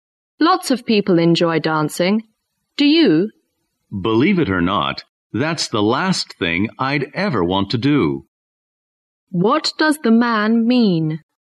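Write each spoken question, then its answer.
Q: What does the man mean?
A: He doesn't like dancing at all.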